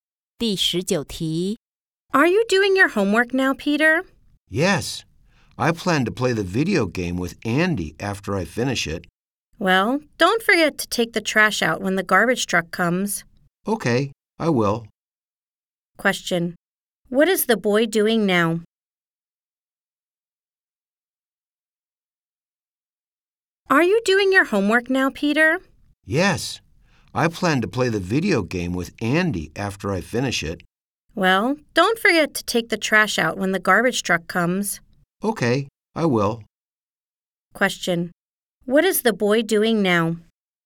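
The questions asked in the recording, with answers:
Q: Question: What is the boy doing now?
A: Doing his homework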